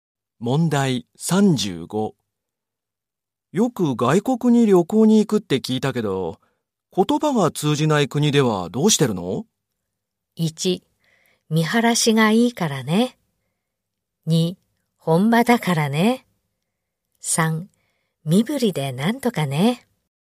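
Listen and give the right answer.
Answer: 3: 身振りでなんとかね。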